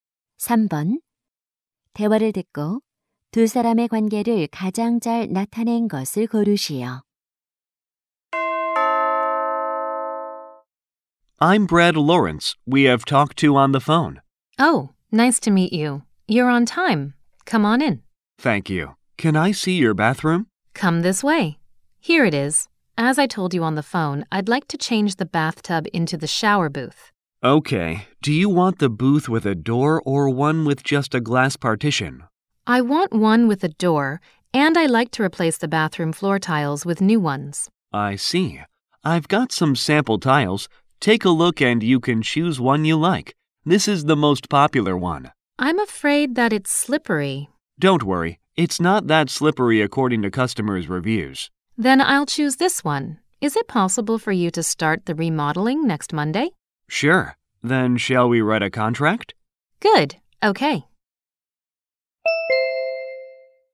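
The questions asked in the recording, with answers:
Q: 대화를 듣고 두 사람의 관계를 가장 잘 나타낸 것을 고르시오.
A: 욕실 리모델링 업자 - 집주인(고객)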